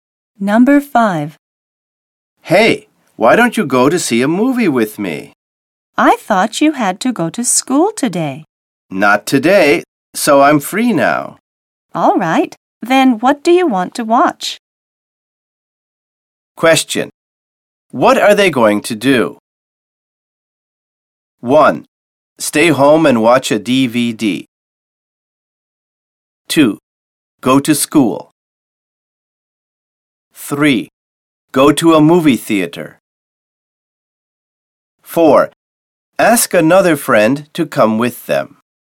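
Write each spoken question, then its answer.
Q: What are they going to do?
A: 3: Go to a movie theater.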